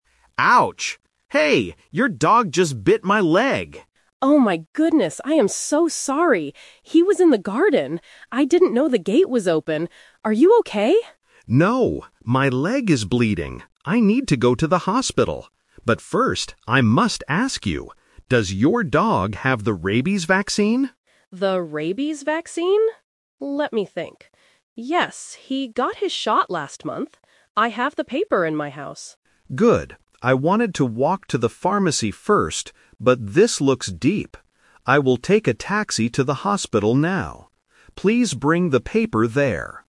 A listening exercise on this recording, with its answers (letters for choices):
Listen to a conversation between a man and a dog owner. Choose the correct answer (A, B, or C).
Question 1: Where did the woman think her dog was?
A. In the house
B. In the garden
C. In the park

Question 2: When did the dog get the rabies vaccine?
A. Last week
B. Last month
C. Last year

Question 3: How is the man going to the hospital?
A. He will walk.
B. He will drive his car.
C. He will take a taxi.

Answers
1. B
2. B
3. C

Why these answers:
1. Mrs. Jones says clearly: "He was in the garden. I didn't know the gate was open." Trap: Option A (In the house) is a distractor. She mentions her house later when she says, "I have the paper in my house," but the dog was in the garden. Option C is not mentioned.
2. Mrs. Jones remembers and confirms: "Yes, he got his shot last month." Trap: Options A and C are plausible timeframes for vaccines, but they are not the correct time mentioned in the audio.
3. Mark changes his mind because the bite is deep: "I will take a taxi to the hospital now." Trap (The Twist): Option A (He will walk) is a strong trap. Mark says he wanted to walk to the pharmacy first, but he decides not to do it. Option B is not mentioned.

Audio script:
Mark: Ouch! Hey! Your dog just bit my leg!
Jones: Oh my goodness! I am so sorry! He was in the garden. I didn't know the gate was open. Are you okay?
Mark: No, my leg is bleeding. I need to go to the hospital. But first, I must ask you: does your dog have the rabies vaccine?
Jones: The rabies vaccine? Let me think... Yes, he got his shot last month. I have the paper in my house.
Mark: Good. I wanted to walk to the pharmacy first, but this looks deep. I will take a taxi to the hospital now. Please bring the paper there.